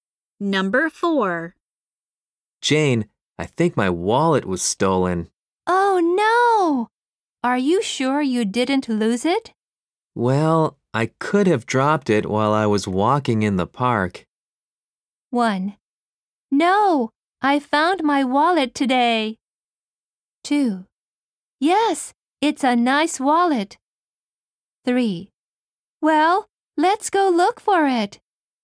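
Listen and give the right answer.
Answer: 3: Well, let's go look for it.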